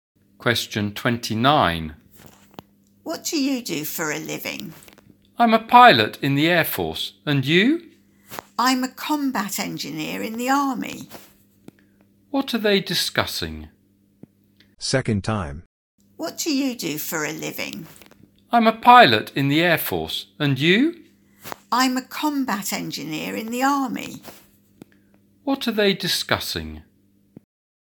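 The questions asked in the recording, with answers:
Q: What are they discussing?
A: Their jobs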